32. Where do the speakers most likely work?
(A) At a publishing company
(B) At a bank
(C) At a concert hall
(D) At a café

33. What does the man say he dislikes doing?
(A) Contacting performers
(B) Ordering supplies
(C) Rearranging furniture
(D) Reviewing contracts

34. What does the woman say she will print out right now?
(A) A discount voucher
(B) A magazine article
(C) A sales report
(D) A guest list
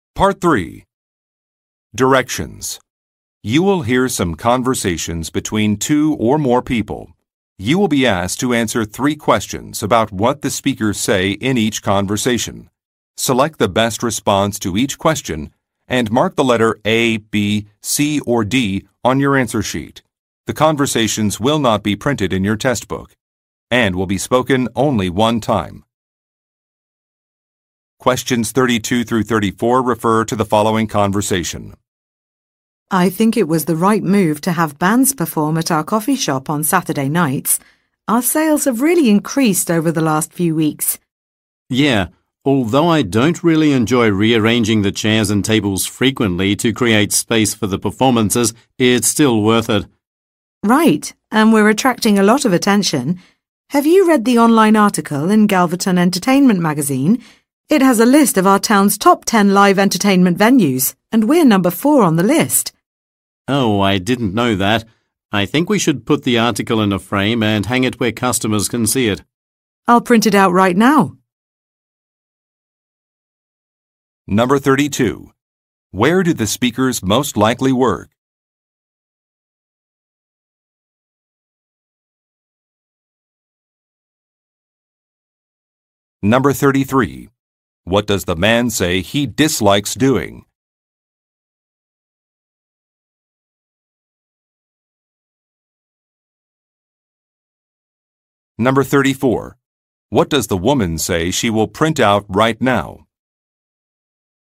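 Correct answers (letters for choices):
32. D
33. C
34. B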